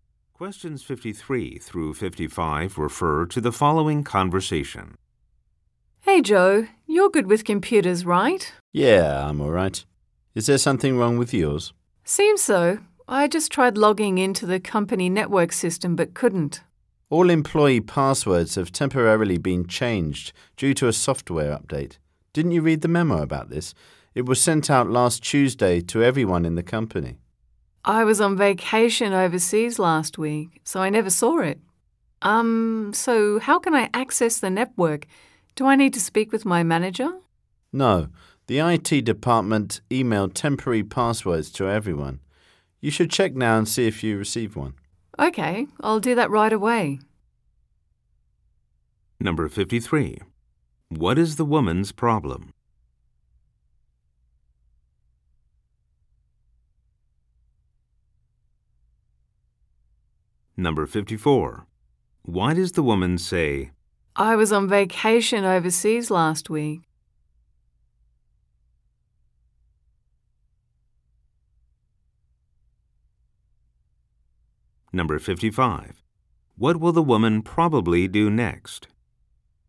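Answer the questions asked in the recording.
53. She can't log into the company network
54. To explain why she didn't see the memo
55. Check her email for a temporary password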